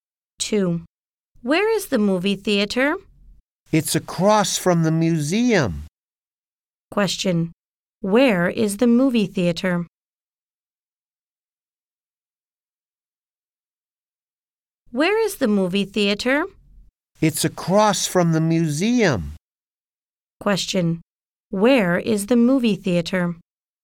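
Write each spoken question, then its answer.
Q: Where is the movie theater?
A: Across from the museum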